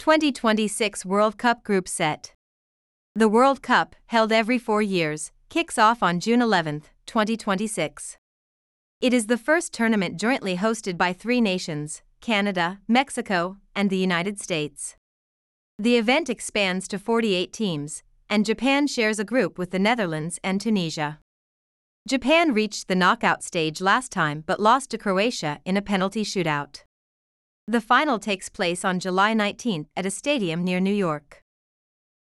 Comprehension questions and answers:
次の各質問の答えを探しながら聞きましょう。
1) Which nation hosts the 2026 World Cup?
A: It is hosted by three nations: Canada, Mexico, and the United States.

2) Which nations does Japan share a group with?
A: Japan shares a group with the Netherlands and Tunisia.

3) How did Japan lose in the last tournament?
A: Japan lost to Croatia in a penalty shootout.

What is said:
The World Cup, held every four years, kicks off on June 11, 2026.
It is the first tournament jointly hosted by three nations: Canada, Mexico, and the United States.
The event expands to 48 teams, and Japan shares a group with the Netherlands and Tunisia.
Japan reached the knockout stage last time but lost to Croatia in a penalty shootout.
The final takes place on July 19 at a stadium near New York.